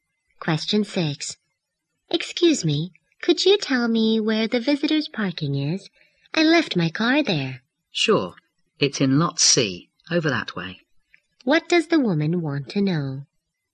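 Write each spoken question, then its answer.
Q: What does the woman want to know?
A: Where the visitor's parking is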